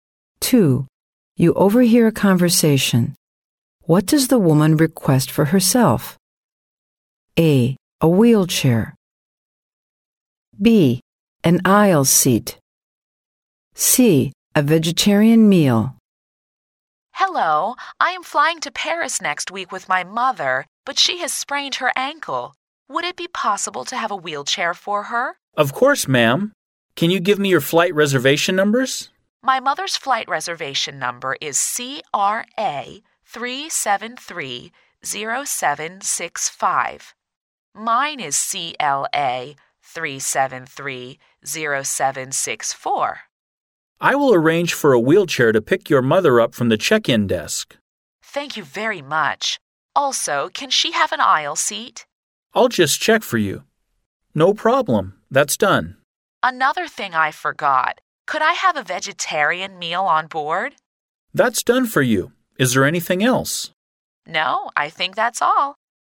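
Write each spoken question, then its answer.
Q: What does the woman request for herself?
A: C: A vegetarian meal.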